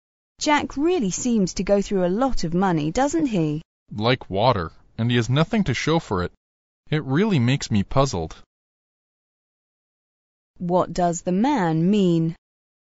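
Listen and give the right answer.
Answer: Jack wastes his money and has nothing to show for it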